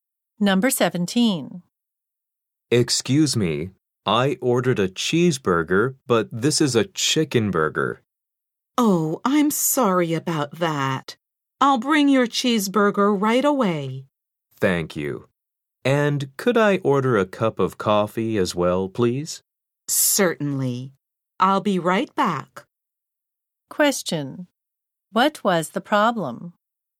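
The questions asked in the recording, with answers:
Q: What was the problem?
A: The man got a chicken burger instead of the cheeseburger he ordered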